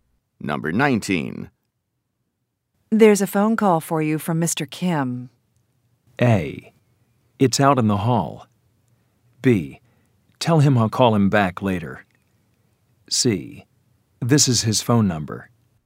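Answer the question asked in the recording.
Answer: B: Tell him I'll call him back later.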